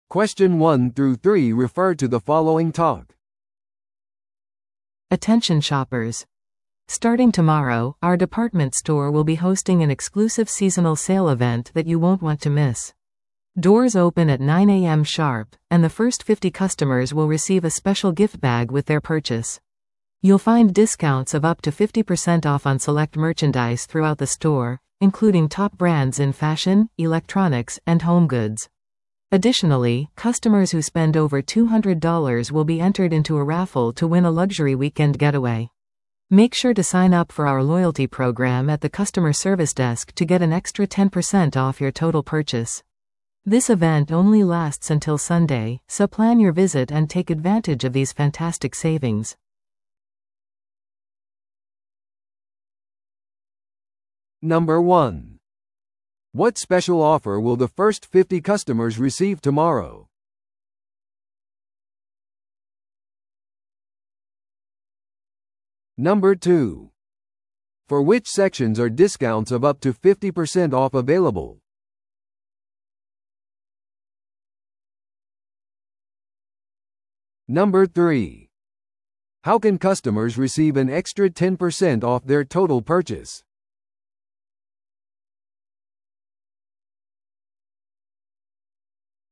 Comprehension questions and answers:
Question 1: What special offer will the first 50 customers receive tomorrow?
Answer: 特別なギフトバッグ

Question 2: For which sections are discounts of up to 50% off available?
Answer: 店内の特定商品

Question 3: How can customers receive an extra 10% off their total purchase?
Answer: ロイヤルティプログラムに登録することによって

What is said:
Attention shoppers! Starting tomorrow, our department store will be hosting an exclusive seasonal sale event that you won't want to miss. Doors open at 9am sharp, and the first 50 customers will receive a special gift bag with their purchase. You'll find discounts of up to 50% off on select merchandise throughout the store, including top brands in fashion, electronics, and home goods. Additionally, customers who spend over $200 will be entered into a raffle to win a luxury weekend getaway. Make sure to sign up for our loyalty program at the customer service desk to get an extra 10% off your total purchase. This event only lasts until Sunday, so plan your visit and take advantage of these fantastic savings!